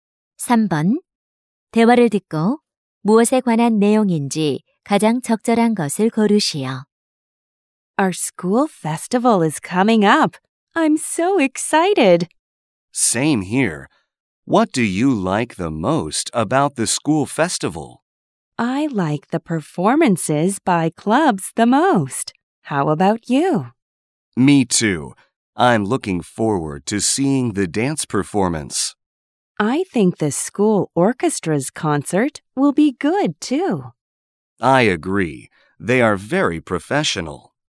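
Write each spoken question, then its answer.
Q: 대화를 듣고 무엇에 관한 내용인지 가장 적절한 것을 고르시오.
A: 학교 축제에서 가장 기대하는 것(동아리 공연)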